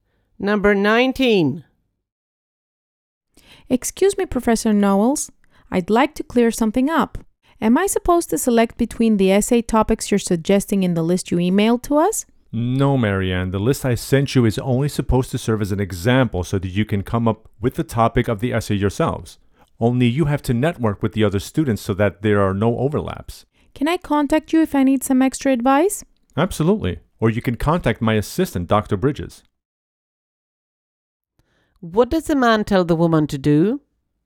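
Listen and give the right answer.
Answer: Come up with her own essay topic, coordinating with other students to avoid overlaps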